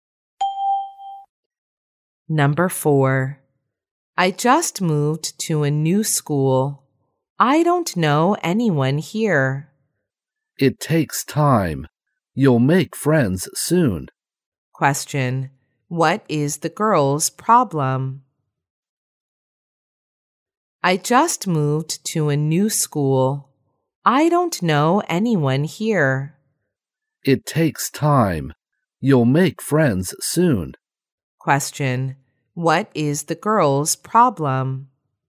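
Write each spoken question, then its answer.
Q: What is the girl's problem?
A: She just moved to a new school and doesn't know anyone.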